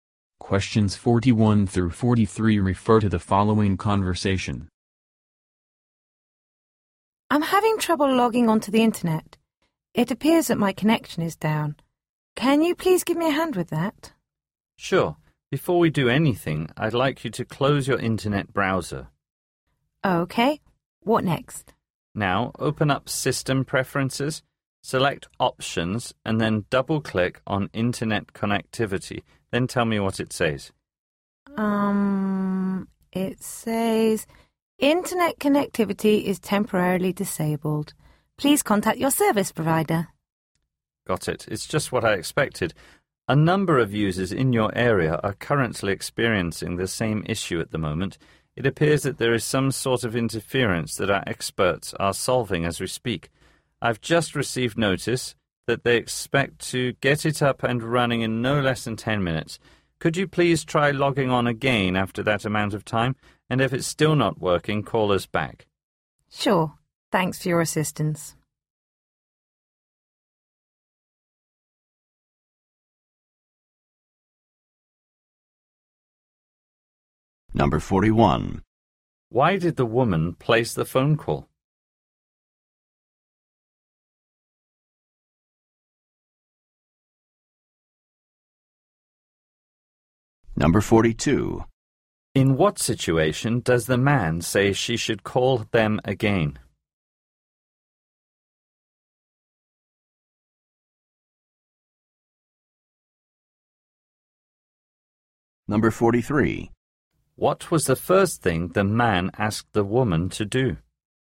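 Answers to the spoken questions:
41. Her internet connection was down
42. If it still isn't working after 10 minutes
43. Close her internet browser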